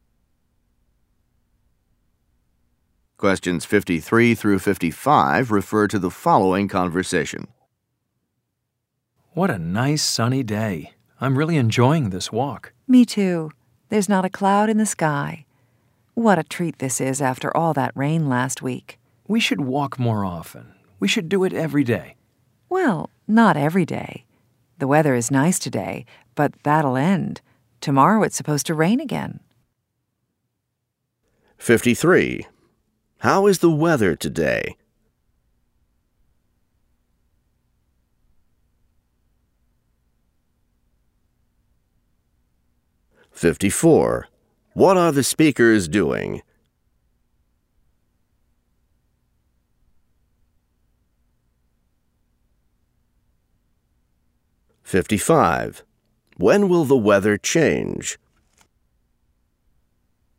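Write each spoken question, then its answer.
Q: How is the weather today?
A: Sunny

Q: What are the speakers doing?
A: Taking a walk

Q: When will the weather change?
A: Tomorrow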